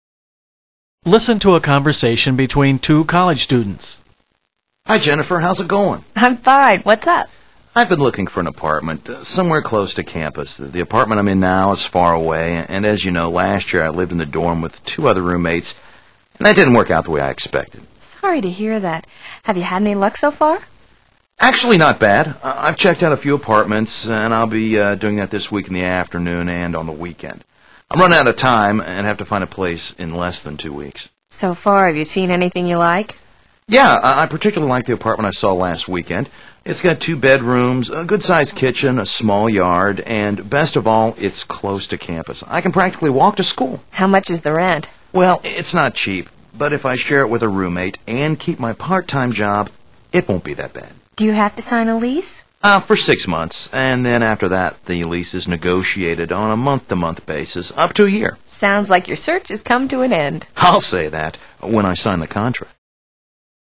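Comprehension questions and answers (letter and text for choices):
When does the man have to move out?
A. In approximately two weeks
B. In a month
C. In six months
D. In less than a year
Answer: A. In approximately two weeks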